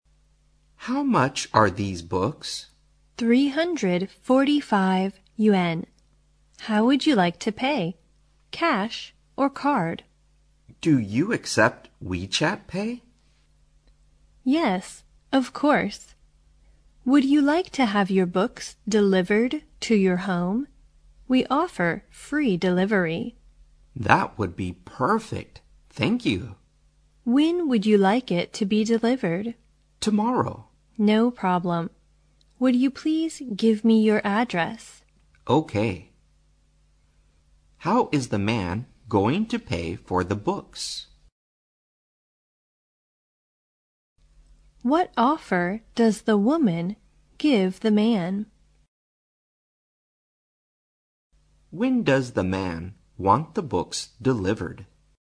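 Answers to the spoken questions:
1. By WeChat Pay
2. Free delivery to his home
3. Tomorrow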